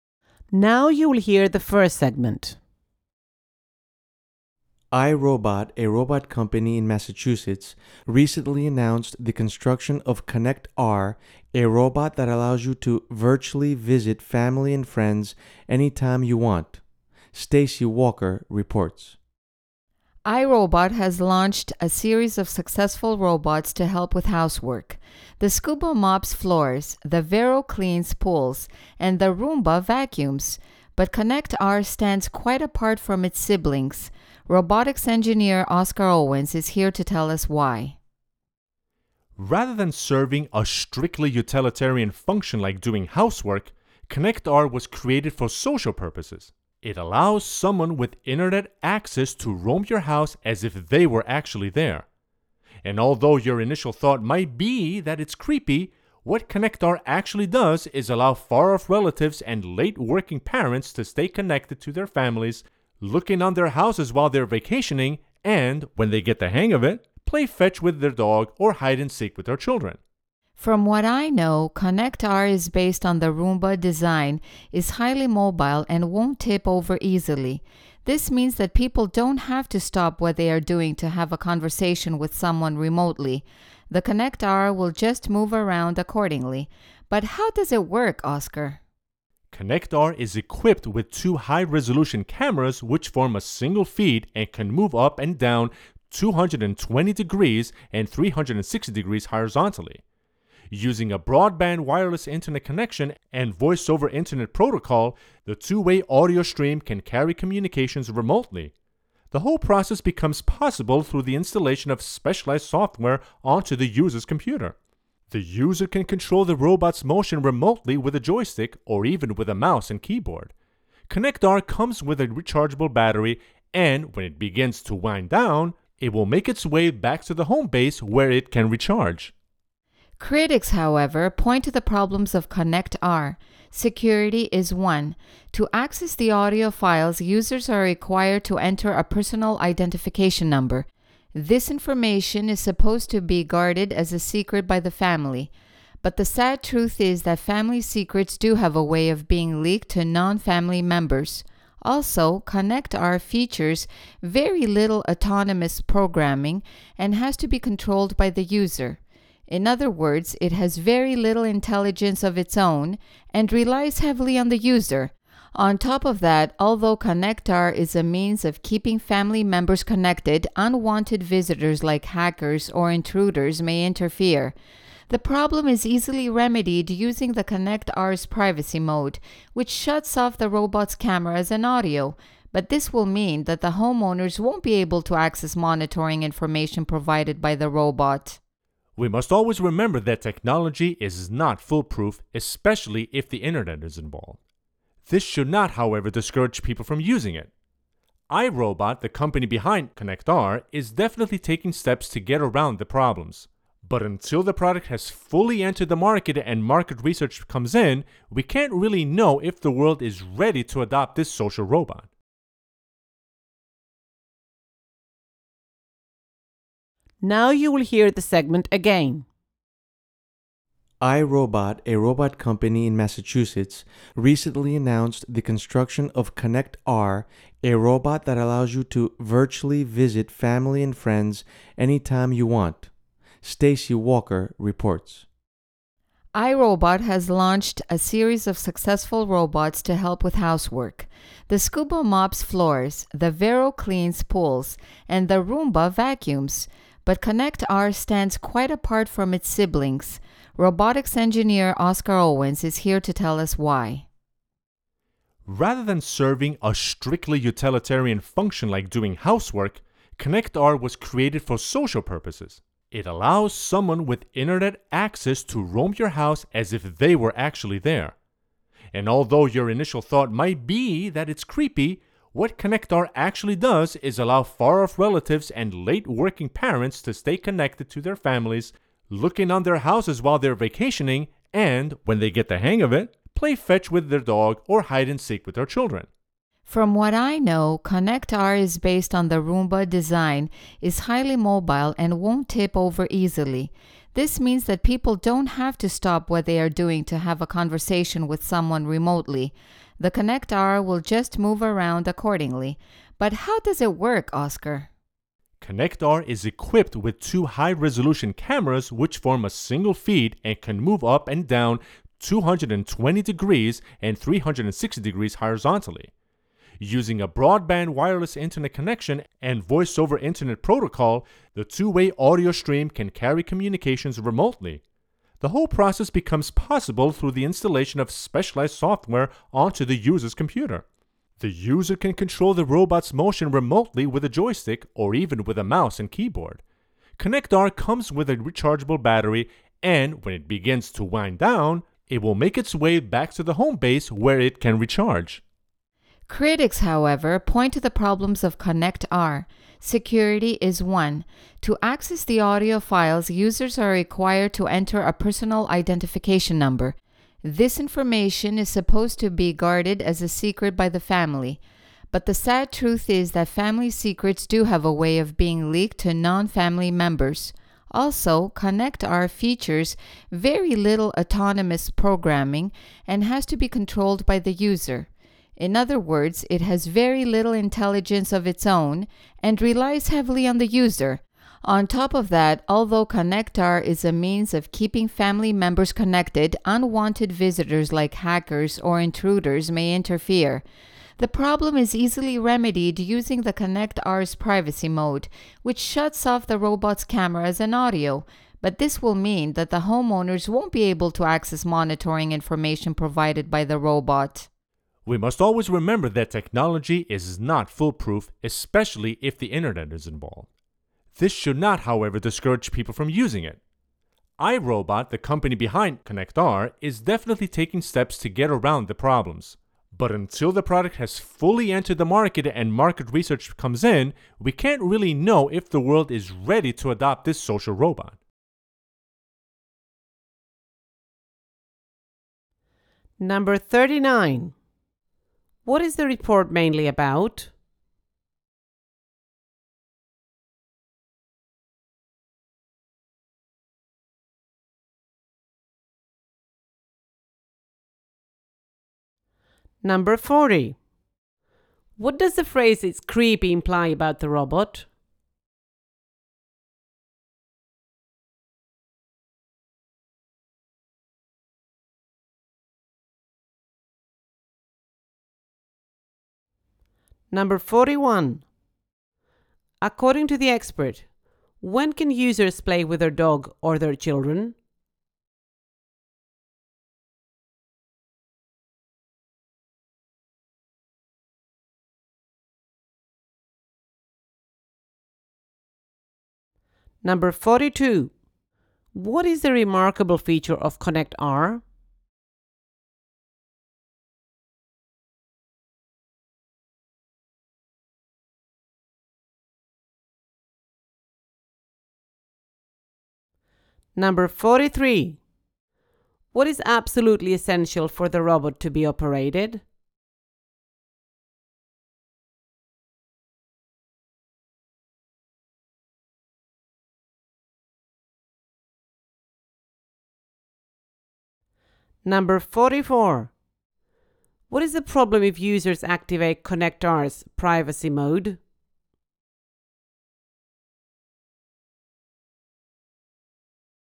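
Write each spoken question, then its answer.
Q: What is the report mainly about?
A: ConnectR, a social robot that lets you virtually visit family and friends

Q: According to the expert, when can users play with their dog or their children?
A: When they get the hang of it

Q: What is the problem if users activate ConnectR's privacy mode?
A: Homeowners can't access the robot's monitoring information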